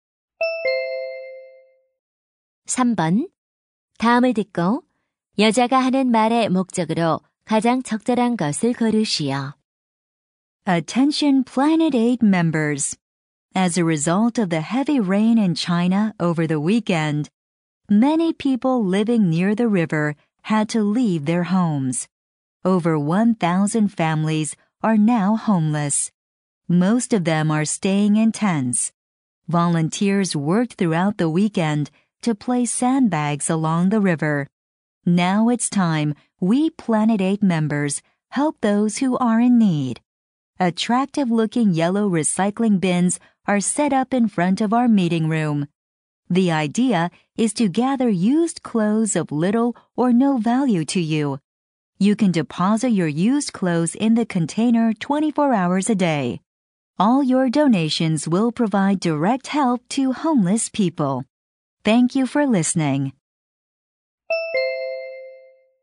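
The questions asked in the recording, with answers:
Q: 다음을 듣고 여자가 하는 말의 목적으로 가장 적절한 것을 고르시오.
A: 홍수 이재민을 위한 헌 옷 기부를 요청하려고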